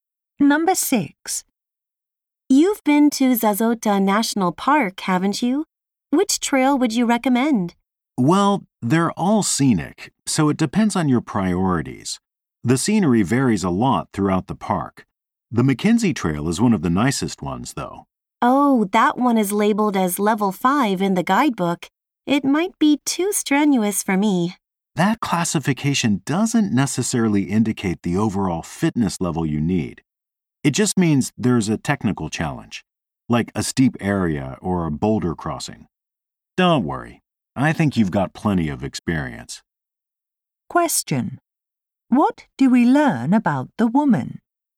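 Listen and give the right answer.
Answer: She is probably fit and experienced enough for the Mackenzie Trail.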